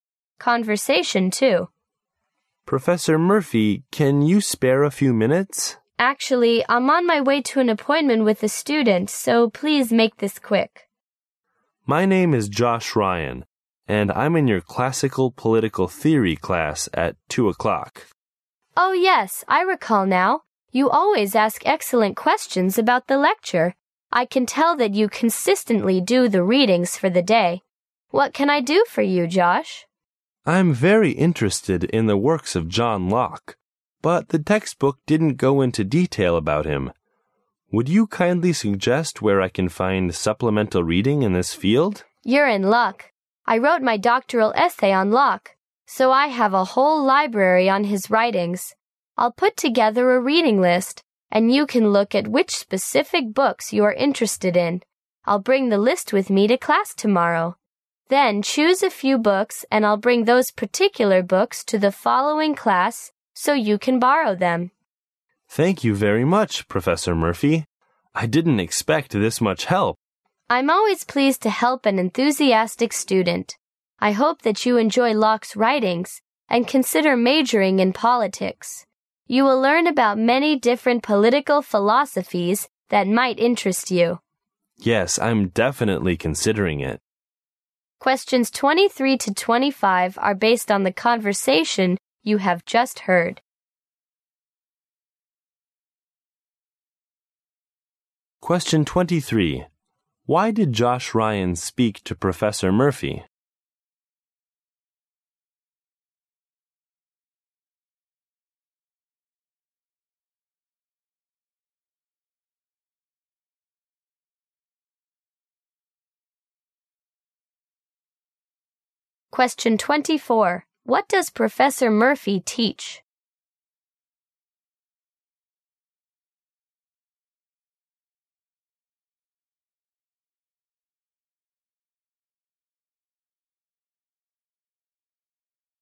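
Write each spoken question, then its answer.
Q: Why did Josh Ryan speak to Professor Murphy?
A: To ask where to find more reading on John Locke

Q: What does Professor Murphy teach?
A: Classical political theory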